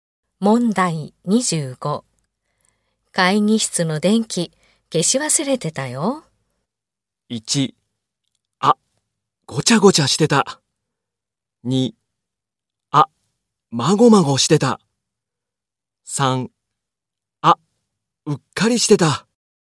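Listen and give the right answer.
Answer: 3: あ、うっかりしてた。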